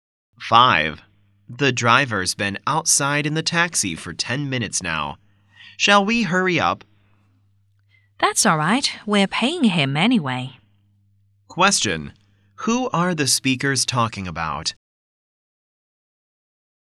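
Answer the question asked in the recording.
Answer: The taxi driver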